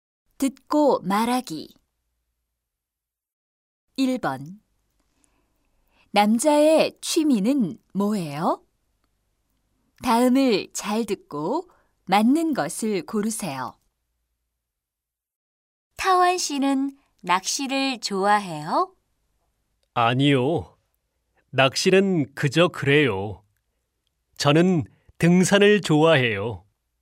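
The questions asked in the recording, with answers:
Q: 남자의 취미는 뭐예요?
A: 등산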